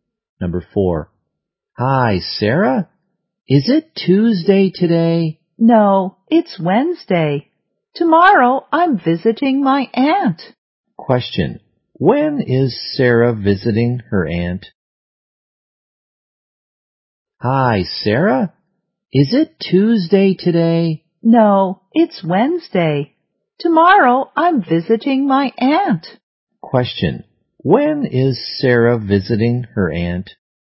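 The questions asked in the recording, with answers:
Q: When is Sarah visiting her aunt?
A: Tomorrow, Thursday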